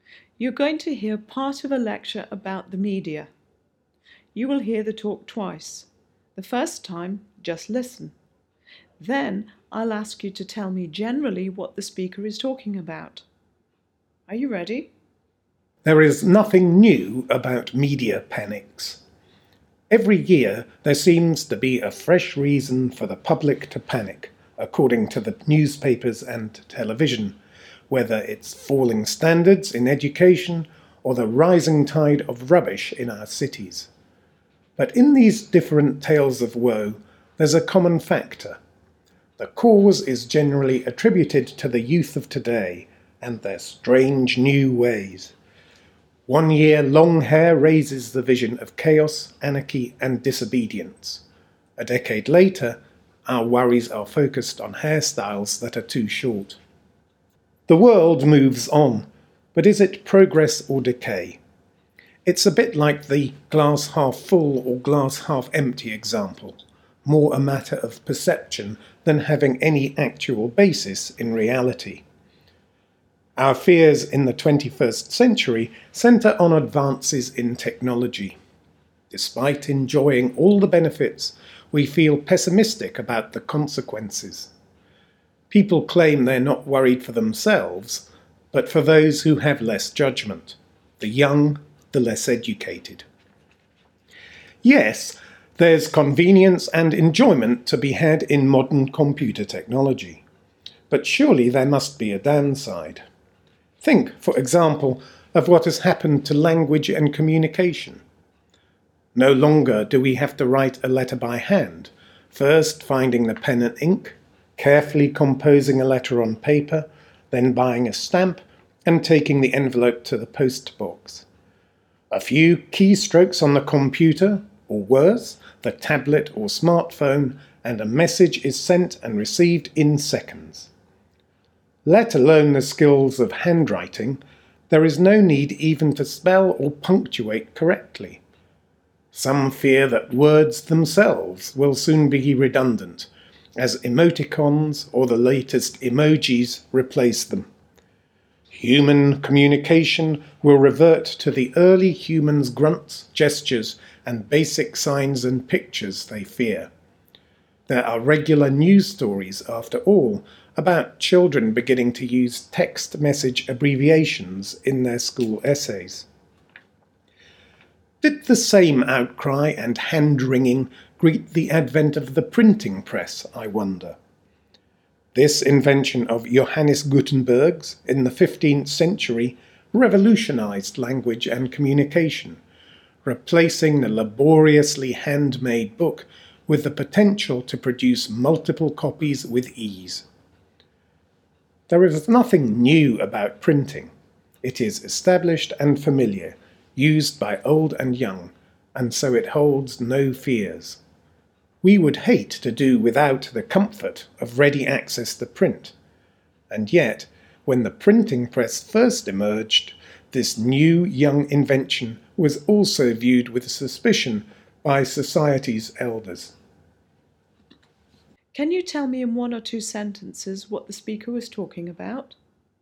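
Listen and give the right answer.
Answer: Media panics, which usually blame young people and new technology (like fears about its effect on language), are nothing new; the printing press was once viewed with suspicion too.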